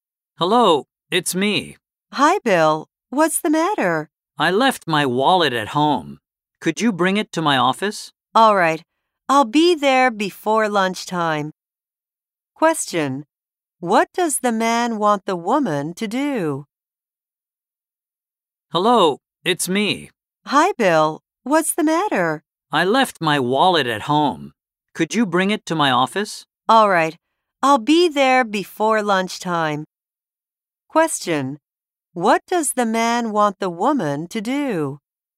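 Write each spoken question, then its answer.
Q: What does the man want the woman to do?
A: Bring his wallet to his office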